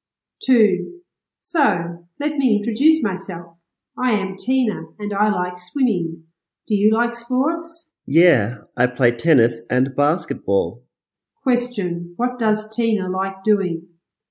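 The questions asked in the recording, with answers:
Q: What does Tina like doing?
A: Swimming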